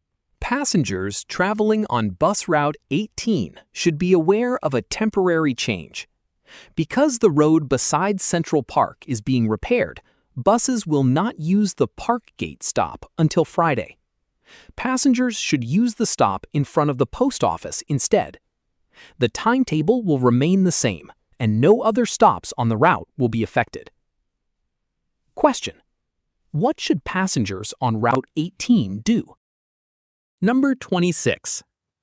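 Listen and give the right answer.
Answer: Use the stop in front of the post office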